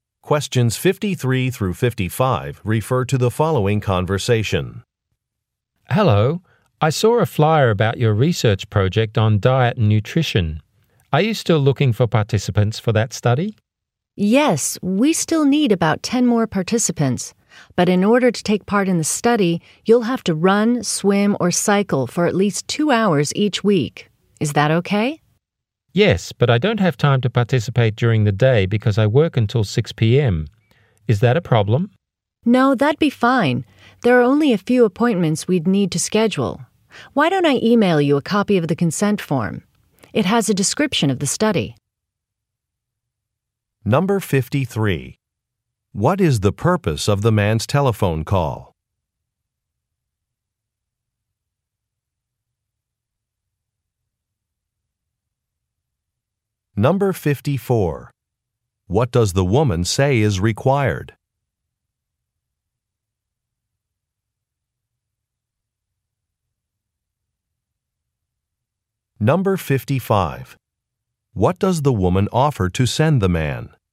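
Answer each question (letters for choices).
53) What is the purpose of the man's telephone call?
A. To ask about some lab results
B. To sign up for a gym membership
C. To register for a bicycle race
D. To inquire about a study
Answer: D

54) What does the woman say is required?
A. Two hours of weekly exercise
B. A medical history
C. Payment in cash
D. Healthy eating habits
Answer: A

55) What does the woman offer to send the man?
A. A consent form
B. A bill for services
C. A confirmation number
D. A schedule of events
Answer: A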